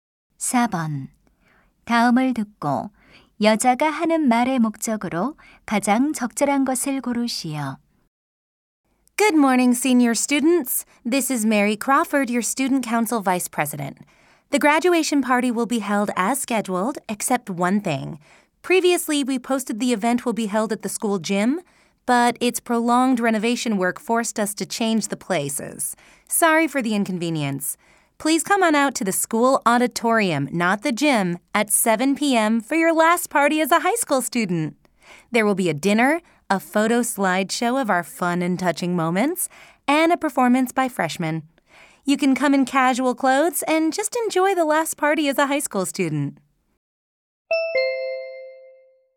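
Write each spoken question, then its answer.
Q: 다음을 듣고 여자가 하는 말의 목적으로 가장 적절한 것을 고르시오.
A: 졸업 파티 장소가 체육관에서 강당으로 변경되었음을 알리려고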